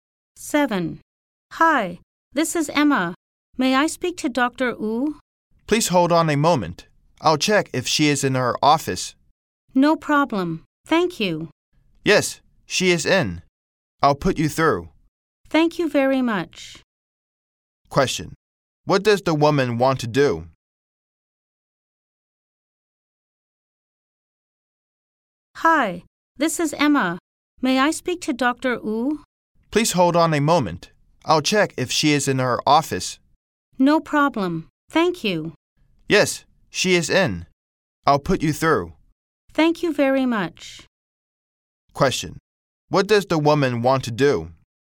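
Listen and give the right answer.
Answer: Speak to Dr. Wu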